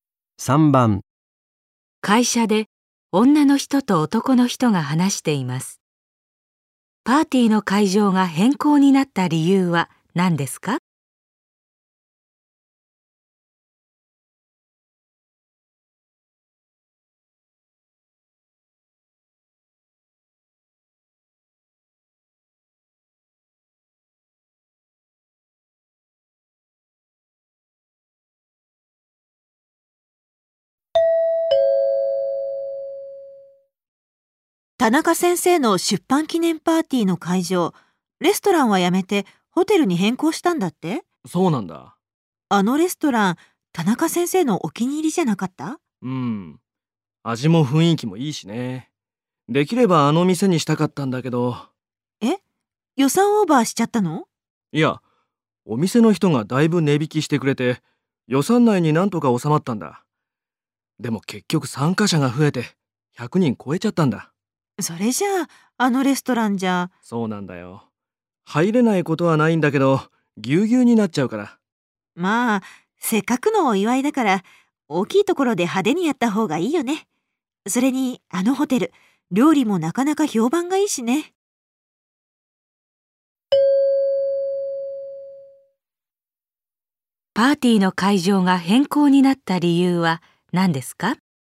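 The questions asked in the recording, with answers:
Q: パーティーの会場が変更になった理由は何ですか?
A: 参加者が100人を超え、レストランでは狭すぎるから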